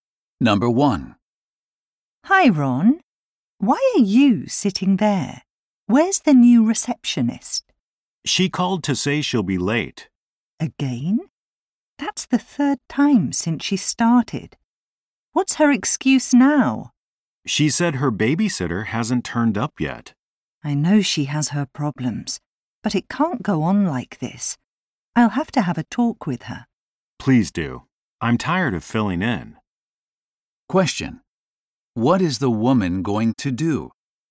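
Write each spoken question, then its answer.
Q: What is the woman going to do?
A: Talk to the new receptionist about her lateness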